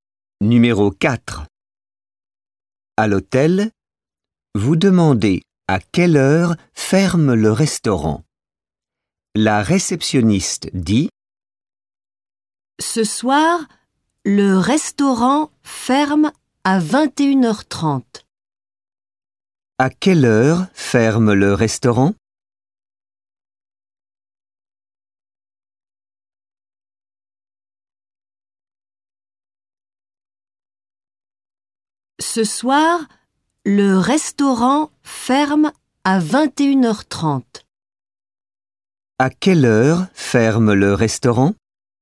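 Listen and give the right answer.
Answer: À 21h30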